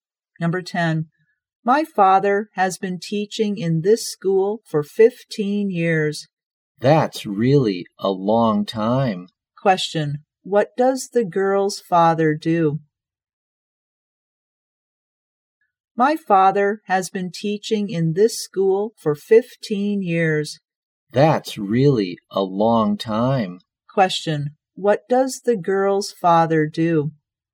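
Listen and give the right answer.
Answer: He is a teacher.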